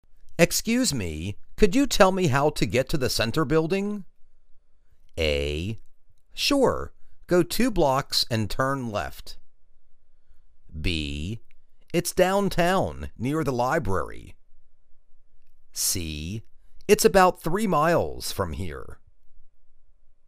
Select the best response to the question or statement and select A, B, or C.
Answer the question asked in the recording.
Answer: Sure. Go two blocks and turn left.